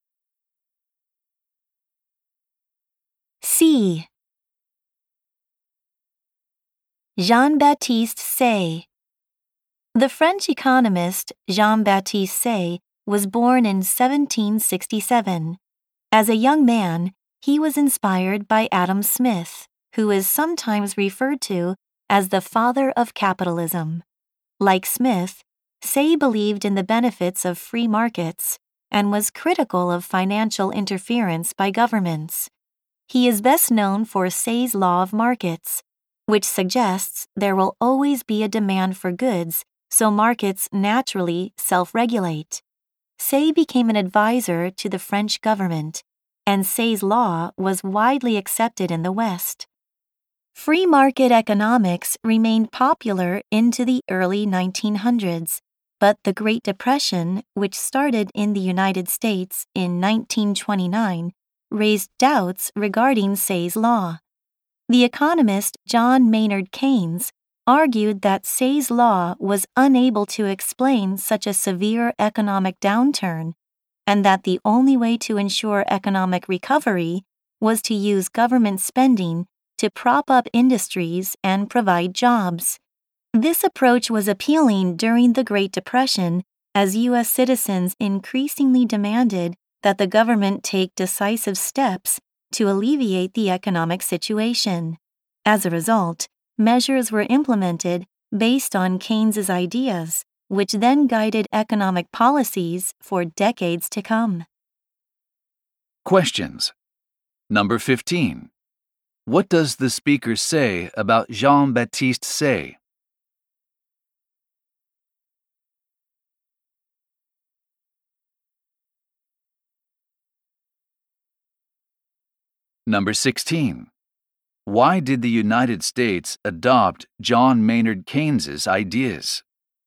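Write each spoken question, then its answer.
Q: Why did the United States adopt John Maynard Keynes's ideas?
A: Citizens demanded that the government act decisively during the Great Depression.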